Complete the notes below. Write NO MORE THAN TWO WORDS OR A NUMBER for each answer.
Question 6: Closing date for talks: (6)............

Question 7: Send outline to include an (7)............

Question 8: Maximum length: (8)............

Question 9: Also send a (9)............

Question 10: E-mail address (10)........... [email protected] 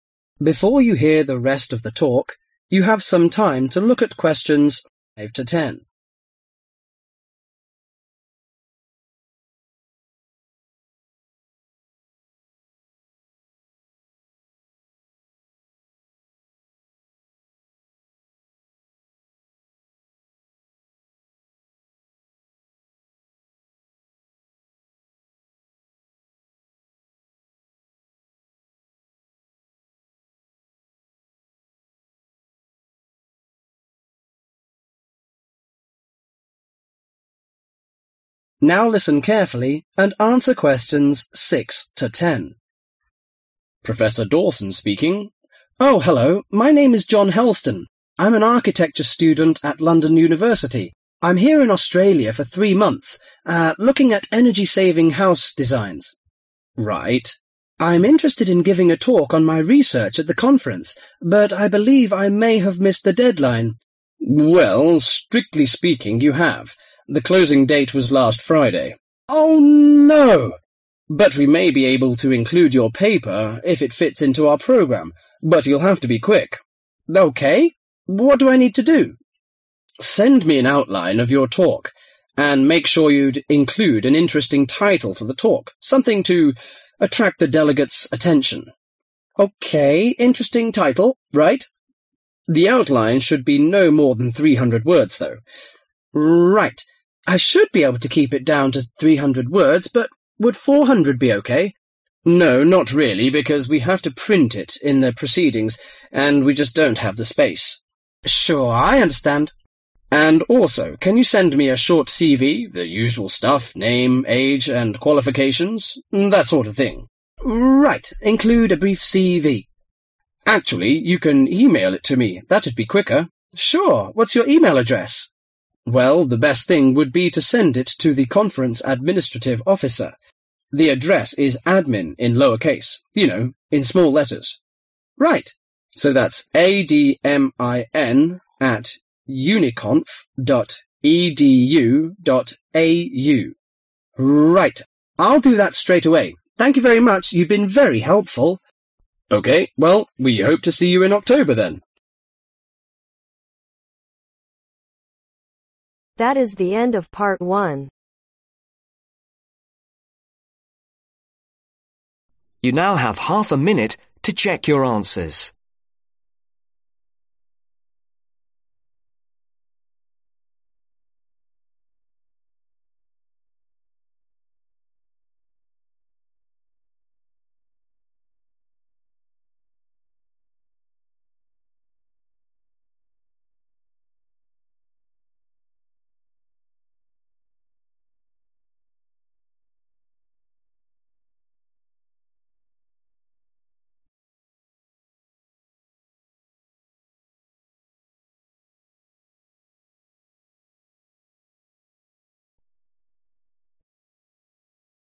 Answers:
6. Last Friday
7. Interesting title
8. 300 words
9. Brief CV
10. Admin